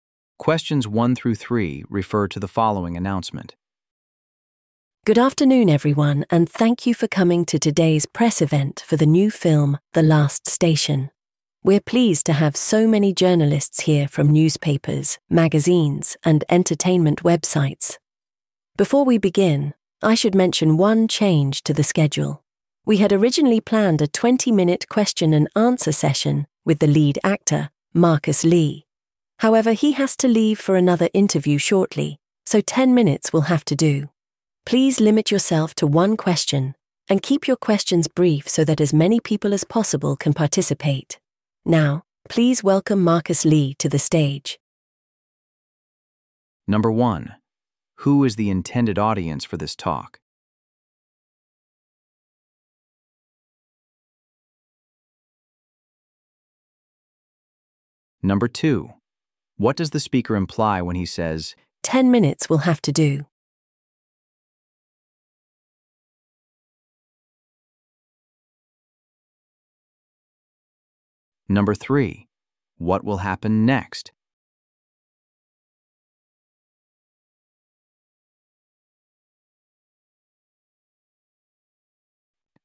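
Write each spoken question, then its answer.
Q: Who is the intended audience for this talk?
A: Journalists

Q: What does the speaker imply when he says, 10 minutes will have to do?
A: The question and answer session will be shorter than planned

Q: What will happen next?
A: Marcus Lee will come to the stage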